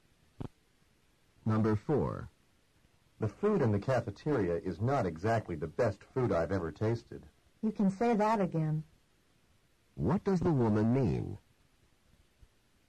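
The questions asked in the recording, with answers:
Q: What does the woman mean?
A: She agrees the cafeteria food isn't good.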